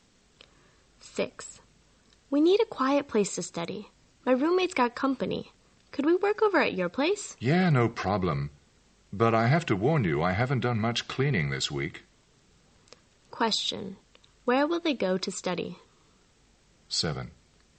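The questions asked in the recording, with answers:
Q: Where will they go to study?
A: At the second speaker's place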